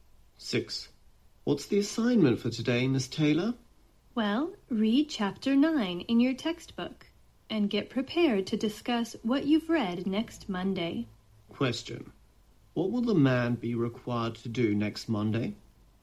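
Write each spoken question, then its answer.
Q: What will the man be required to do next Monday?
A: Discuss Chapter 9 of the textbook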